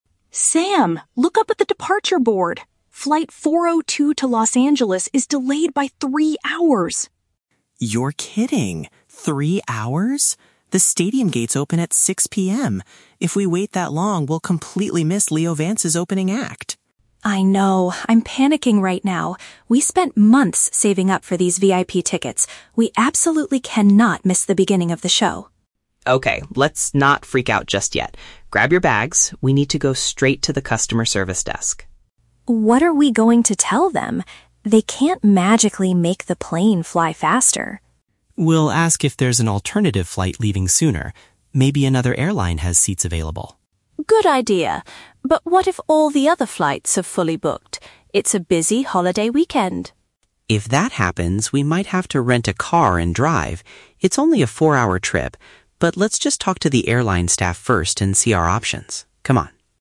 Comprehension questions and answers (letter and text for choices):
Listen to a conversation between two friends at an airport. Choose the correct answer (A, B, or C) for each question.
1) Why are the friends panicking at the beginning of the conversation?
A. Because they lost their expensive VIP concert tickets.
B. Because their plane will depart much later than planned.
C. Because they arrived at the wrong boarding gate.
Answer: B. Because their plane will depart much later than planned.

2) What are they most worried about missing?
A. The first part of the musician's live performance.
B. The chance to meet Leo Vance at the VIP entrance.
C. Their non-refundable hotel reservation in Los Angeles.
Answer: A. The first part of the musician's live performance.

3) What is Sam's immediate plan to solve the problem?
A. To immediately rent a vehicle and drive to the city.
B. To ask for a full refund for their delayed plane tickets.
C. To speak with the airport staff about finding an earlier flight.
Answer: C. To speak with the airport staff about finding an earlier flight.

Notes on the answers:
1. Jess sees that their flight is "delayed by three hours," which means their plane will depart much later than planned.
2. Sam says, "we'll completely miss Leo Vance's opening act" and Jess adds, "We absolutely cannot miss the beginning of the show" (which paraphrases to the first part of the musician's live performance).
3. Sam says they need to go to the "customer service desk" to "ask if there's an alternative flight leaving sooner" (which means speaking with the airport staff about finding an earlier flight).

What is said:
Jess: Sam, look up at the departure board! Flight 402 to Los Angeles is delayed by three hours!
Sam: You're kidding! The stadium gates open at 6 PM. If we wait that long, we'll completely miss Leo Vance's opening act!
Jess: I know, I'm panicking right now. We spent months saving up for these VIP tickets. We absolutely cannot miss the beginning of the show.
Sam: Okay, let's not freak out just yet. Grab your bags. We need to go straight to the customer service desk.
Jess: What are we going to tell them? They can't magically make the plane fly faster.
Sam: We'll ask if there's an alternative flight leaving sooner. Maybe another airline has seats available.
Jess: Good idea. But what if all the other flights are fully booked? It's a busy holiday weekend.
Sam: If that happens, we might have to rent a car and drive. It's only a four-hour trip. But let's just talk to the airline staff first and see our options. Come on!